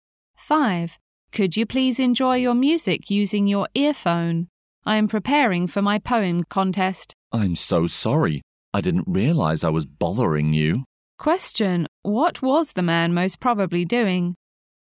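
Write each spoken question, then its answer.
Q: What was the man most probably doing?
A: Playing music loudly without earphones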